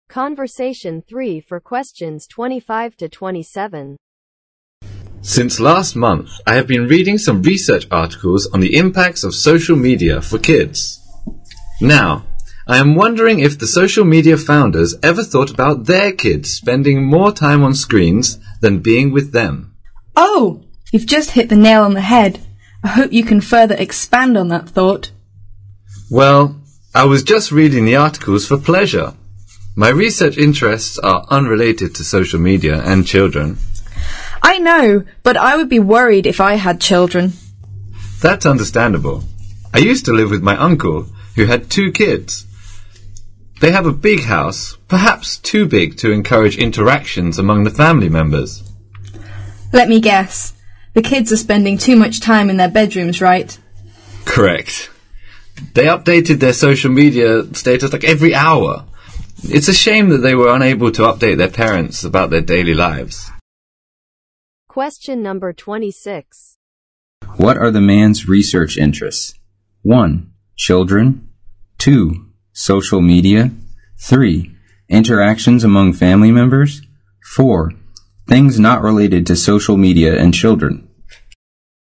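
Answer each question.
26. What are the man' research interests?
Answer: Things not related to social media and children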